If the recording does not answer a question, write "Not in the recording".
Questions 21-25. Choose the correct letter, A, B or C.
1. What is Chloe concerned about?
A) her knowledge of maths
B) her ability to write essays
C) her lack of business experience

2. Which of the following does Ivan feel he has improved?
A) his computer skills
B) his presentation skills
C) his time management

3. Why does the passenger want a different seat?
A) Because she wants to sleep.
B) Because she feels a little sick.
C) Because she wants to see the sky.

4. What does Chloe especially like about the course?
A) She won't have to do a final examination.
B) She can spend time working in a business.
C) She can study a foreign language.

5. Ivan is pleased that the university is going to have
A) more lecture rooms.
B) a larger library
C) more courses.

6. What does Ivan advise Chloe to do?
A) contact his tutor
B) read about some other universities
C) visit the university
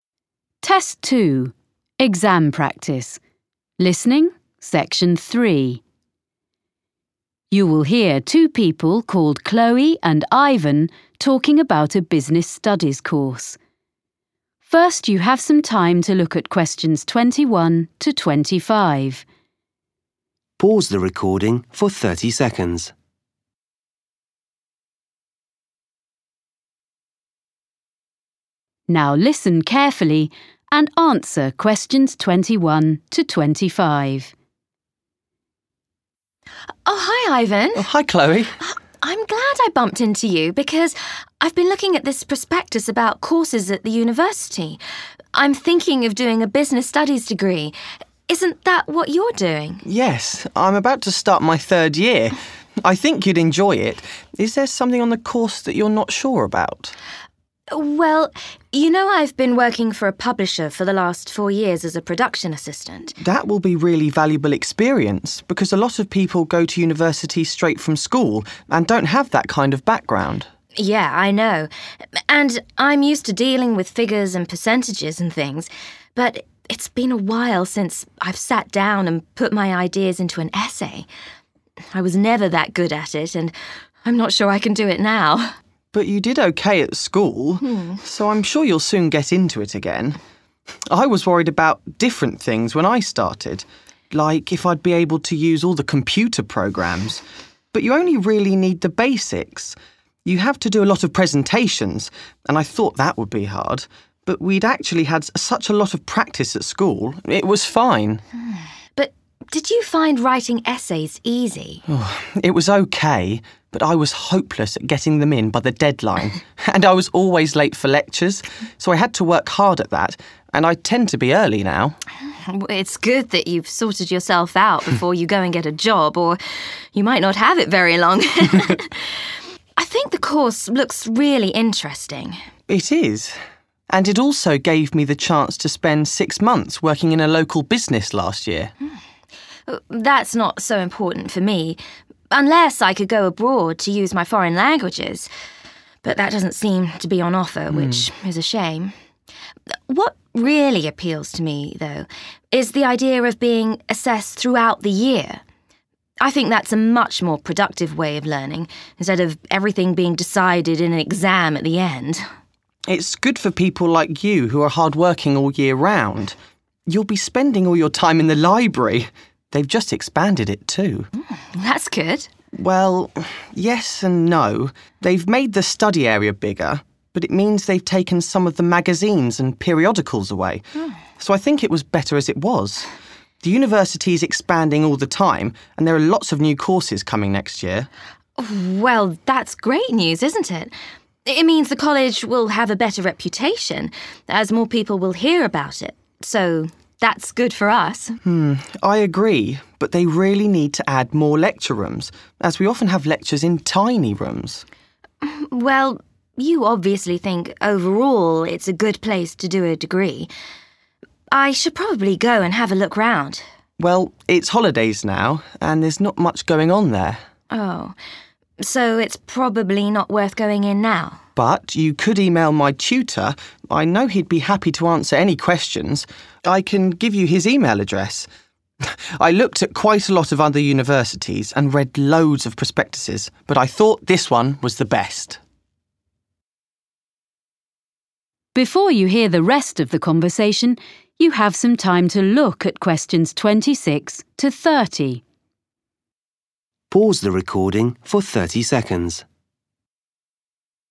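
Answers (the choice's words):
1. her ability to write essays
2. his time management
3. Not in the recording
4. She won't have to do a final examination.
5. more courses.
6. contact his tutor

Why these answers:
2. Ivan: It was OK but I was hopeless at getting them in by the deadline and I was always late for lectures, so I had to work hard at that and I tend to be early now. (tôi đã cảm thấy vô vọng để có thể hoàn thành chúng trước thời hạn và tôi luôn đến muộn trong các buổi học, vì vậy tôi cần phải làm việc chăm chỉ và giờ đây tôi thường đến sớm.)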